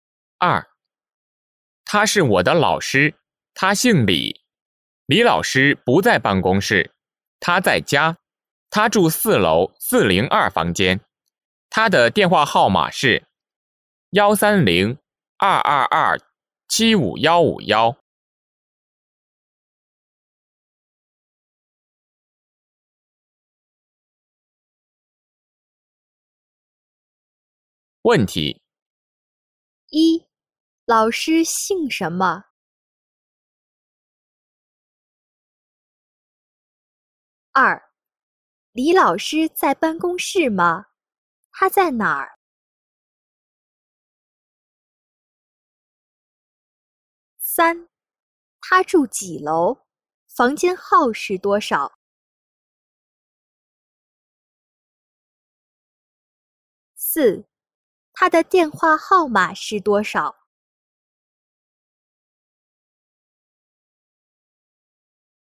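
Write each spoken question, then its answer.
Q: 李老师在办公室吗?他在哪儿?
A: 不在,他在家

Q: 他住几楼? 房间号是多少?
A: 四楼,402房间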